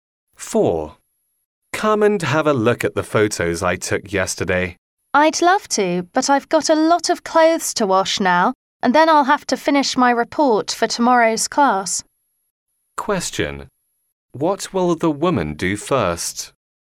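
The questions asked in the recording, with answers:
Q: What will the woman do first?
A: Wash clothes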